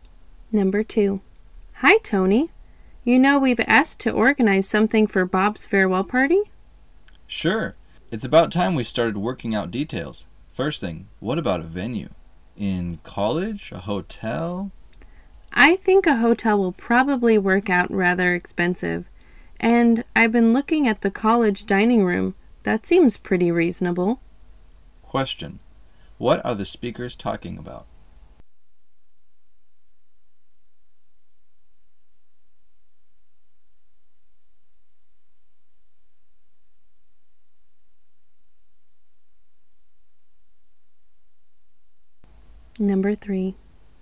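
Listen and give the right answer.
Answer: Where to hold Bob's farewell party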